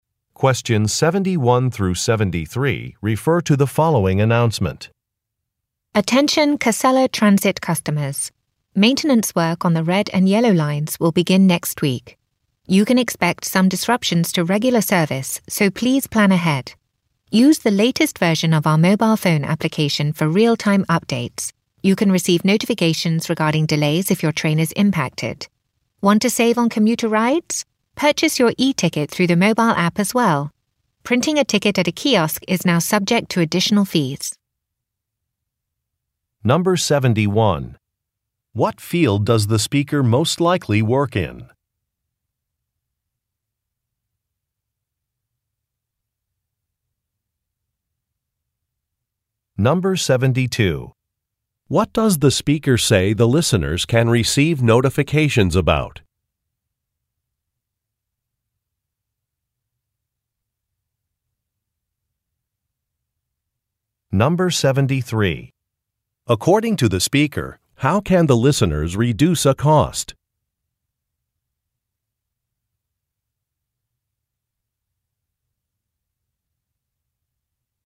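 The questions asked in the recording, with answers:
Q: What field does the speaker most likely work in?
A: Public transportation

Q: What does the speaker say the listeners can receive notifications about?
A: Train delays

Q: According to the speaker, how can the listeners reduce a cost?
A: By buying e-tickets through the mobile app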